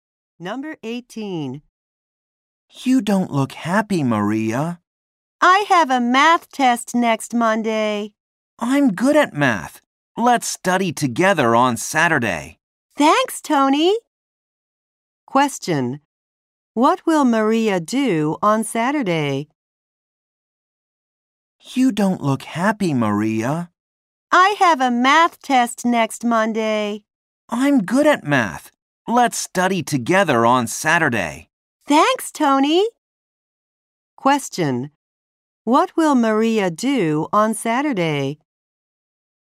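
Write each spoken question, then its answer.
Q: What will Maria do on Saturday?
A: Study math with Tony.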